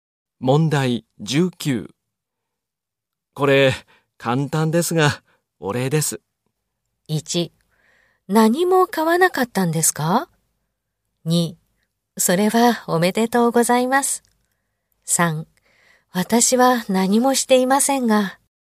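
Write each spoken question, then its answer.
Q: これ、簡単ですが、お礼です。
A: 3: 私は何もしていませんが。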